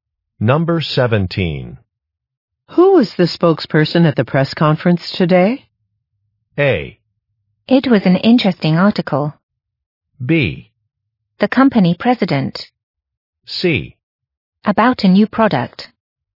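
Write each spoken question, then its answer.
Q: Who was the spokesperson at the press conference today?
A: B: The company president.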